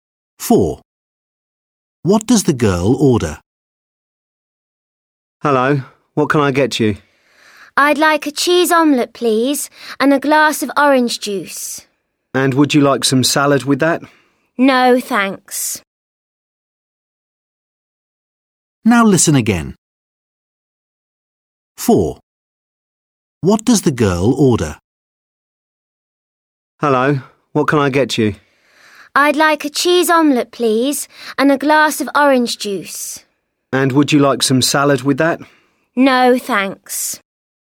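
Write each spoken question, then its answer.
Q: What does the girl order?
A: a cheese omelette and orange juice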